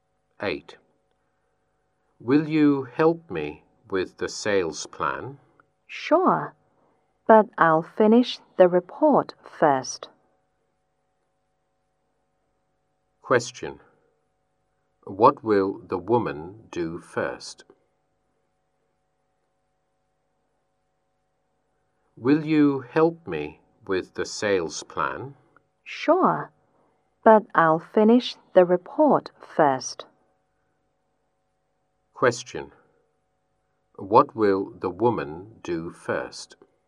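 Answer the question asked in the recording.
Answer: Finish the report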